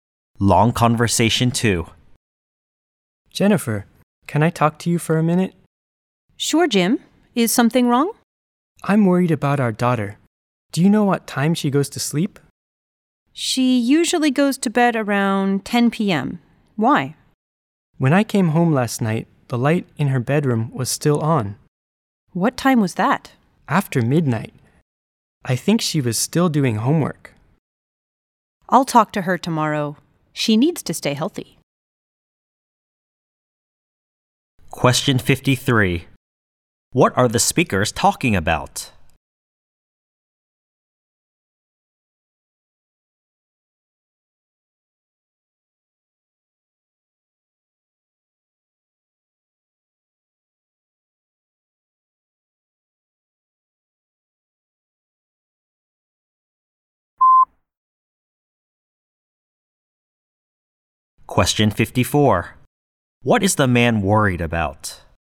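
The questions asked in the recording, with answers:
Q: What are the speakers talking about?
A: Their daughter's sleeping time

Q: What is the man worried about?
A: Their daughter stays up too late, after midnight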